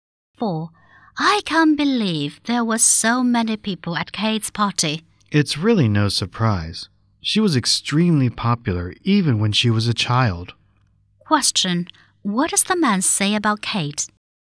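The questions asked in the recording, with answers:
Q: What does the man say about Kate?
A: She has always been very popular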